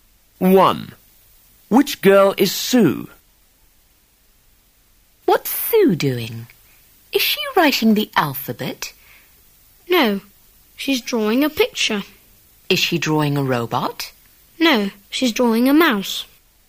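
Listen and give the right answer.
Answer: The girl drawing a mouse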